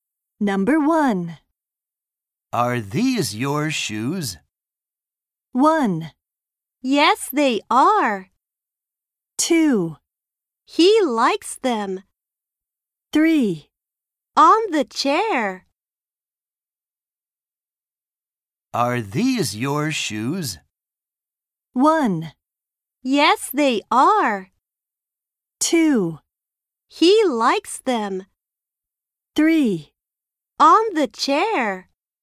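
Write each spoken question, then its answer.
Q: Are these your shoes?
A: 1: Yes, they are.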